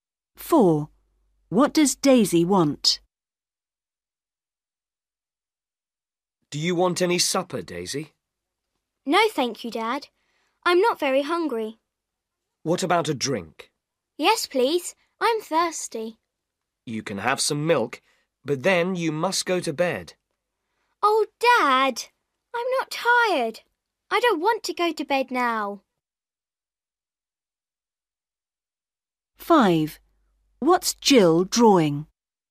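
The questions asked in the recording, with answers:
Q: What does Daisy want?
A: a drink (some milk)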